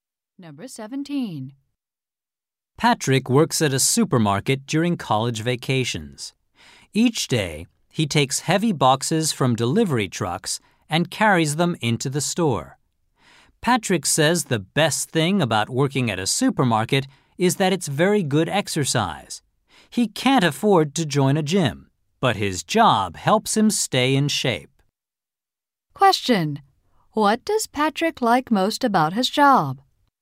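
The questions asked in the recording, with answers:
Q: What does Patrick like most about his job?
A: It is very good exercise.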